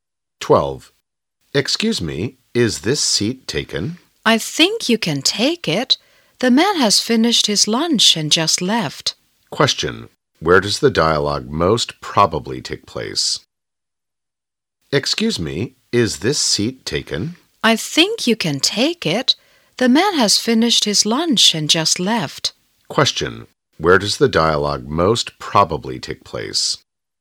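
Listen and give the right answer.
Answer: In a restaurant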